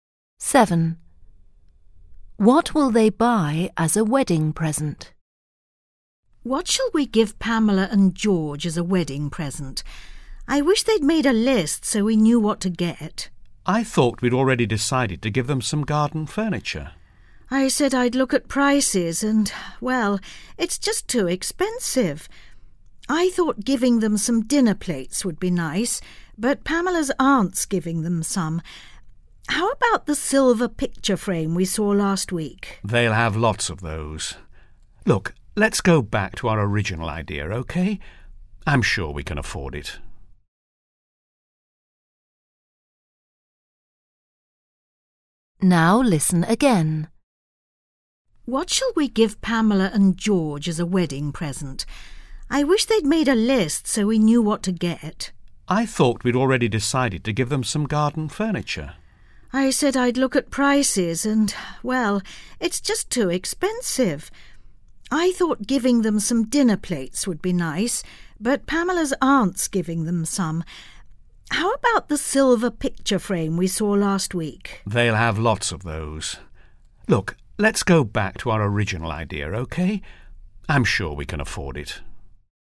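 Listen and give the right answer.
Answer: Garden furniture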